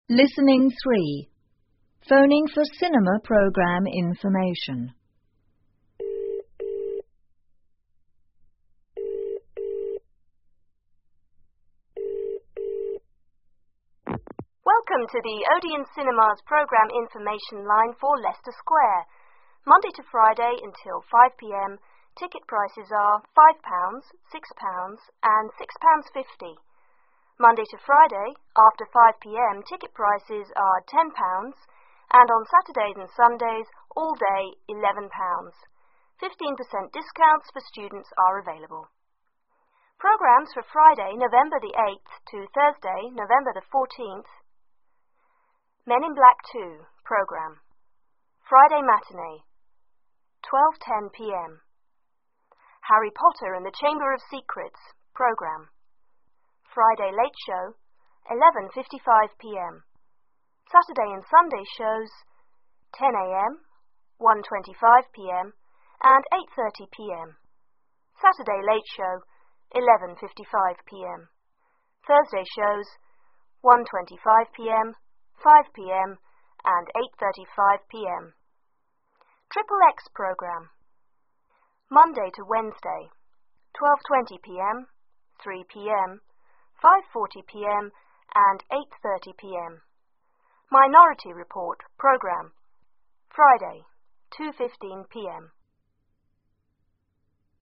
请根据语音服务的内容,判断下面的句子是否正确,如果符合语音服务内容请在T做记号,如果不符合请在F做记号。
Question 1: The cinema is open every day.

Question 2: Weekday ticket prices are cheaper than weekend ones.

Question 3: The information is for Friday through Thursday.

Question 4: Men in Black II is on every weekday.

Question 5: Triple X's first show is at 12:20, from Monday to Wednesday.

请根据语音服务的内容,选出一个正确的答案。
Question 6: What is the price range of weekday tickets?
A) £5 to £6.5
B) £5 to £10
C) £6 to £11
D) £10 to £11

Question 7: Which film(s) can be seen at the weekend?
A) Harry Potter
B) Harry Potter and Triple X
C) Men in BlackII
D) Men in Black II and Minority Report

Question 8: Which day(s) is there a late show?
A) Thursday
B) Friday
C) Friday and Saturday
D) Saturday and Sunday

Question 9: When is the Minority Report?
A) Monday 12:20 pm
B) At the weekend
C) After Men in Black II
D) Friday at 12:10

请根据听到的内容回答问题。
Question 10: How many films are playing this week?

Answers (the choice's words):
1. T
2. T
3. T
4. F
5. T
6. £5 to £10
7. Harry Potter
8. Friday and Saturday
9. After Men in Black II
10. Four